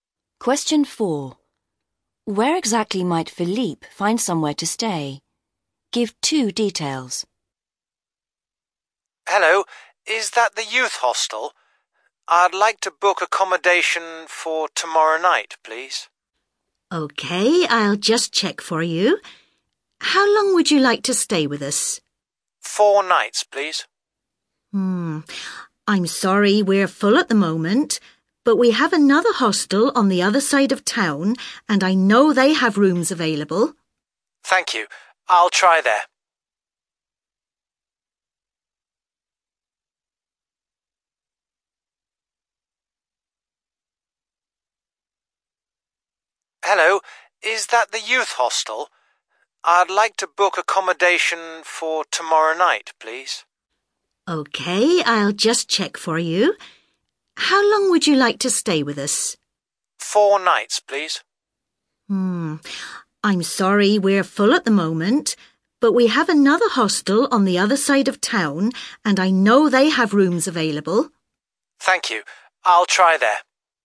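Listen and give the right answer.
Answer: At another youth hostel on the other side of town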